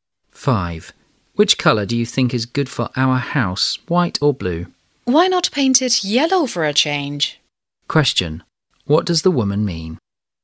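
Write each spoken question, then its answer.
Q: What does the woman mean?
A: She suggests painting the house yellow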